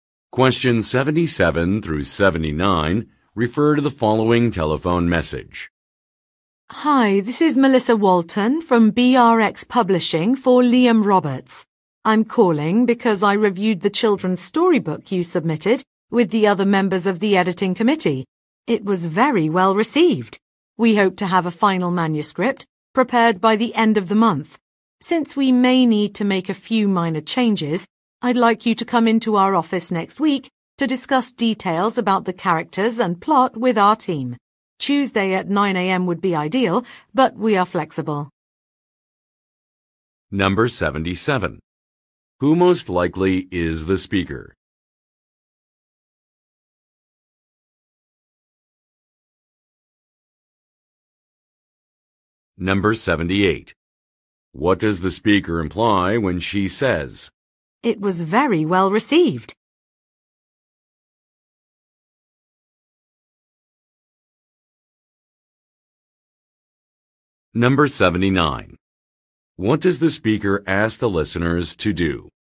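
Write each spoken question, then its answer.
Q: Who most likely is the speaker?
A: An editor at a publishing company

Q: What does the speaker imply when she says, "It was very well received"?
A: The editing committee liked the storybook

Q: What does the speaker ask the listeners to do?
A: Come to the office next week to discuss the characters and plot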